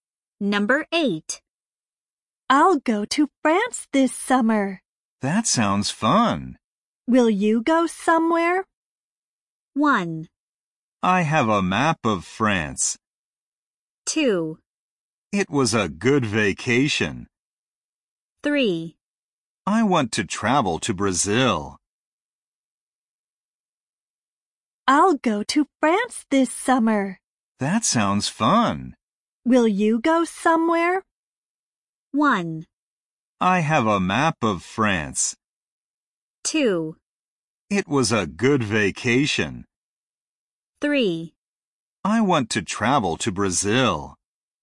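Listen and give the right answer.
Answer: 3: I want to travel to Brazil.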